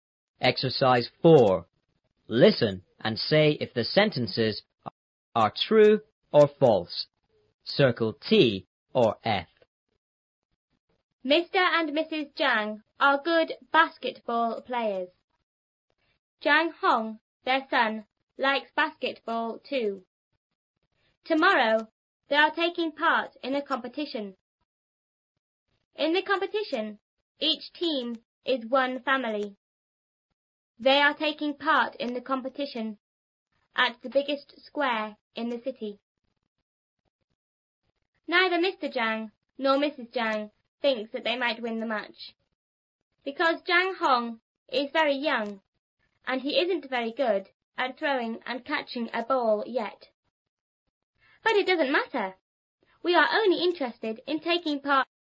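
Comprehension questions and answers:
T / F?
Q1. Zhang Hong doesn't really like playing basketball.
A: F

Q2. The family are all in different teams.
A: F

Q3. The competition is in a big square in the city.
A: T

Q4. Mr and Mrs Zhang are sure they will win.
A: F

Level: 初中英语广州版3B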